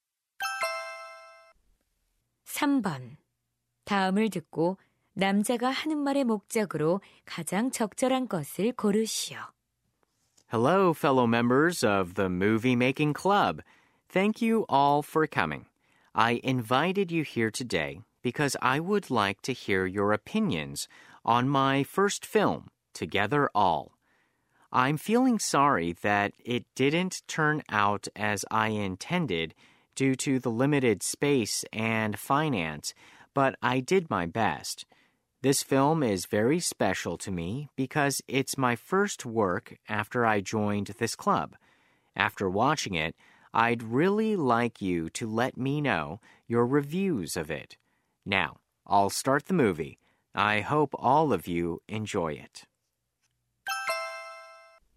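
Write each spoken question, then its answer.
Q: 다음을 듣고 남자가 하는 말의 목적으로 가장 적절한 것을 고르시오.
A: 자신의 첫 영화에 대한 의견(감상평)을 부탁하려고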